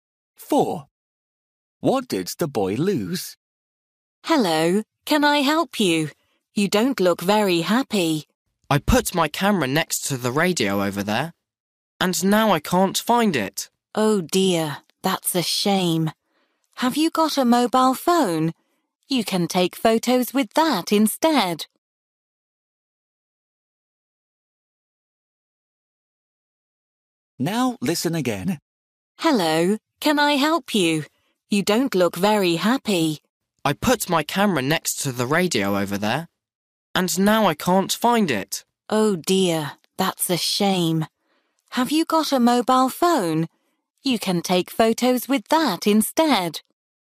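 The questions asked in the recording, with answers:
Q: What did the boy lose?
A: His camera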